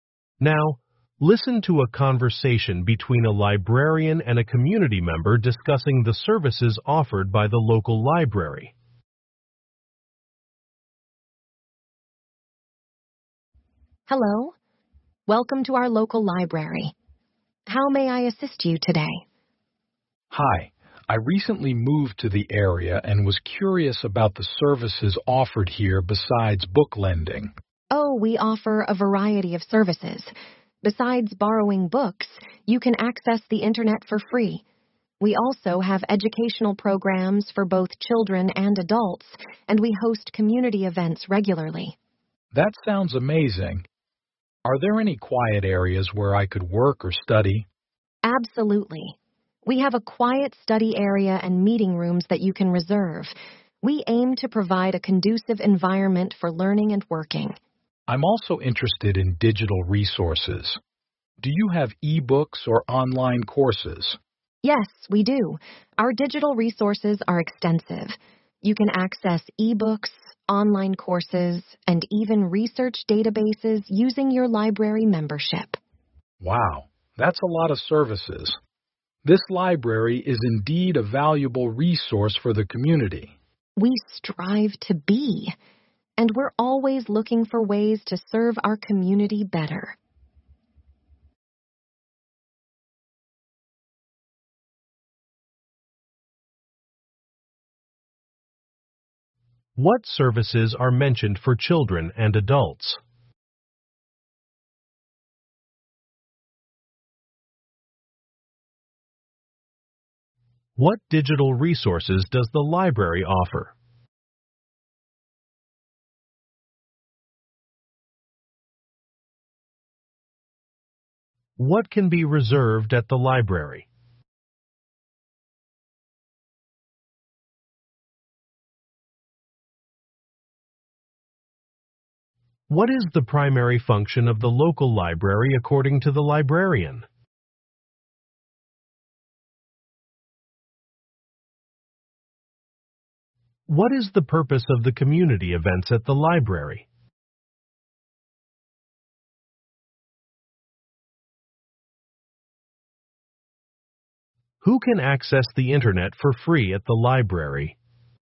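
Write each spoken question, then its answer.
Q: What services are mentioned for children and adults?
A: Educational programs

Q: What digital resources does the library offer?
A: E-books, online courses and research databases

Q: What can be reserved at the library?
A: Meeting rooms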